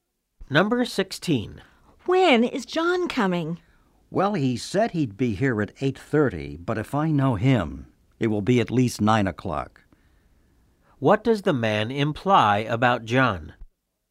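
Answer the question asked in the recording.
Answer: John is usually late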